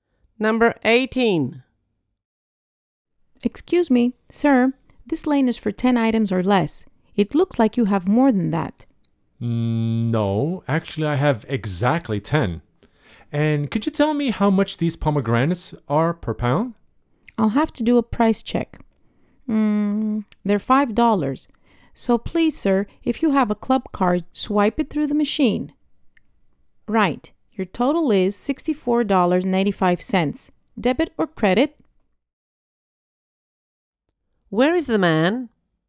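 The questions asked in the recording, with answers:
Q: Where is the man?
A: At a supermarket checkout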